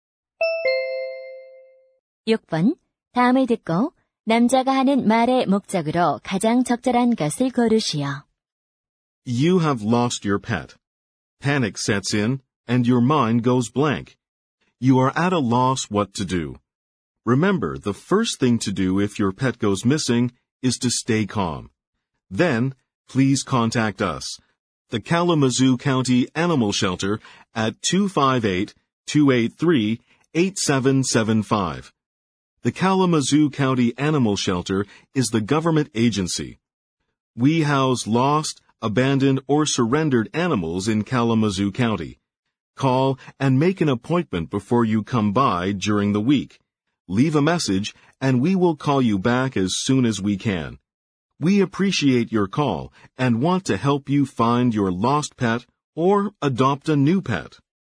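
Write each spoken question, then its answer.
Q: 다음을 듣고 남자가 하는 말의 목적으로 가장 적절한 것을 고르시오.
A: 잃어버린 애완동물을 찾도록 동물 보호소를 안내하려고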